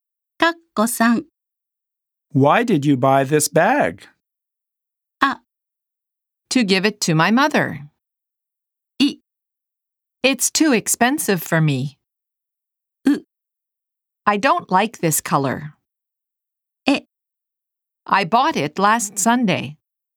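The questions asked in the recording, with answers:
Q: Why did you buy this bag?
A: A: To give it to my mother.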